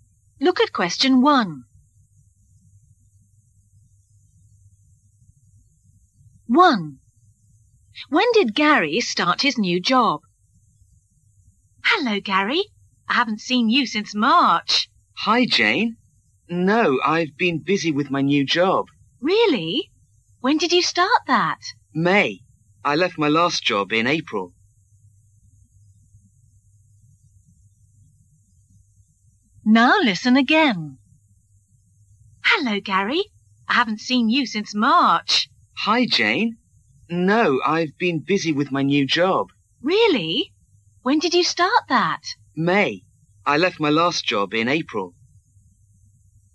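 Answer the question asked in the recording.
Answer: May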